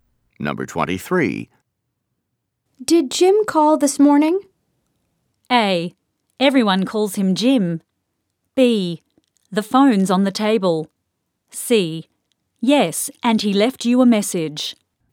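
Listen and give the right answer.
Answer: C: Yes, and he left you a message.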